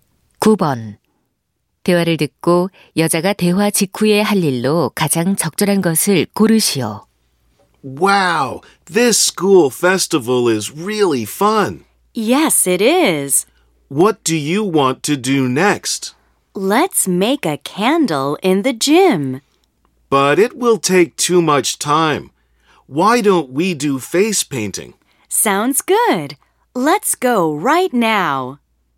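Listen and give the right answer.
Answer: 페이스 페인팅 하기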